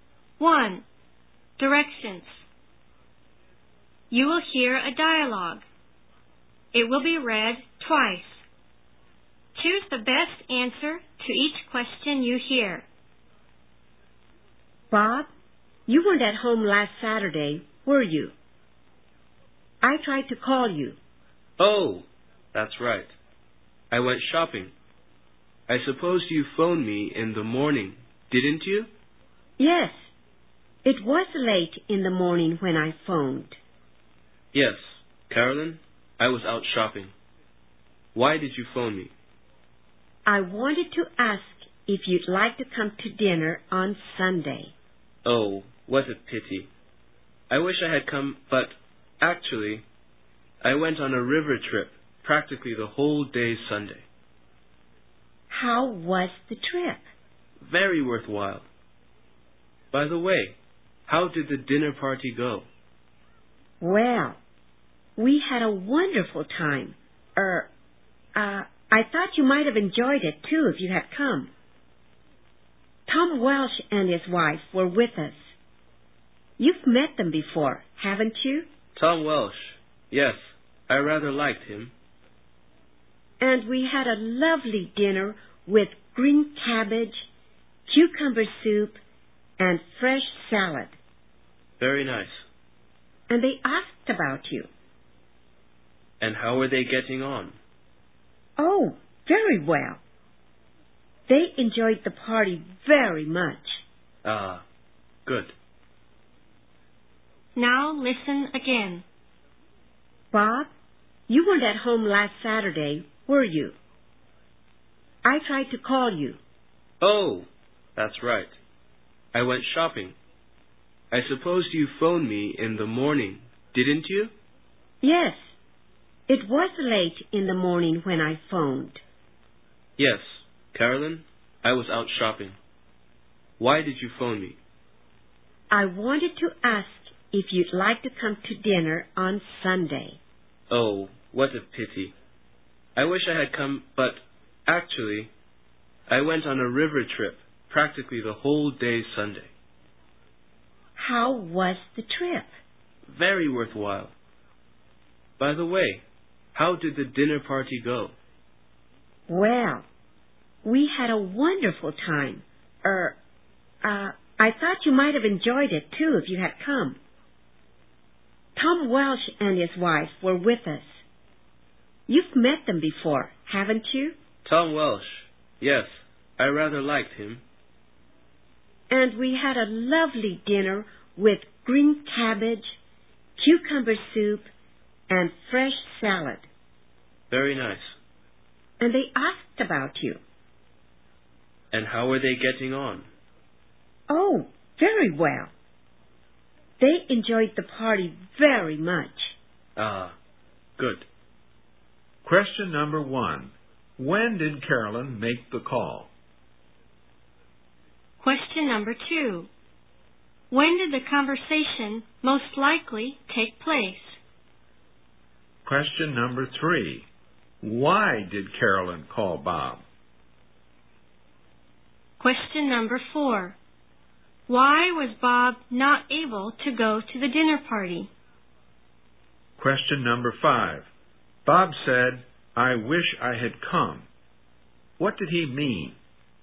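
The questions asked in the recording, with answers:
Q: When did Carolyn make the call?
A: Late in the morning last Saturday

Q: Why did Carolyn call Bob?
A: To invite him to dinner on Sunday

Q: Why was Bob not able to go to the dinner party?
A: He went on a river trip almost all day Sunday

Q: Bob said, "I wish I had come." What did he mean?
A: He didn't go and is sorry he missed it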